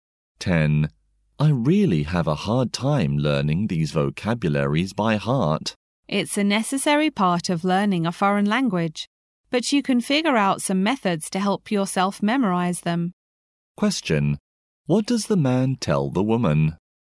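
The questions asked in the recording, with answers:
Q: What does the man tell the woman?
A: She can find methods to help memorize vocabulary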